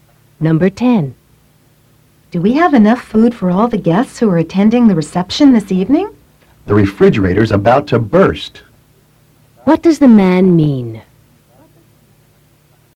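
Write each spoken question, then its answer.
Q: What does the man mean?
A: There is plenty of food.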